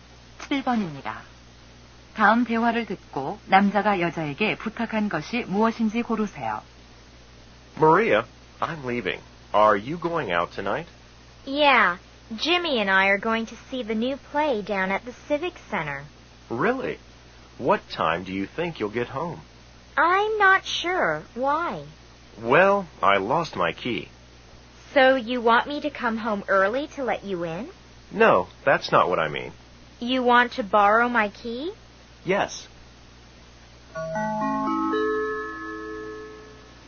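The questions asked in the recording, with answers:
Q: 다음 대화를 듣고 남자가 여자에게 부탁한 것이 무엇인지 고르세요.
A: 열쇠를 빌려 달라는 것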